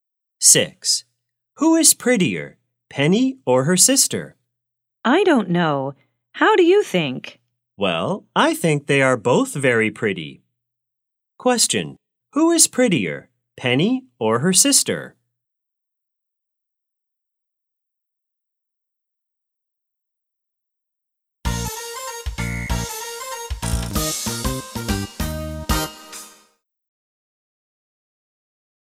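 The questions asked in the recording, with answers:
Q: Question, who is prettier, Penny or her sister?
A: Both are very pretty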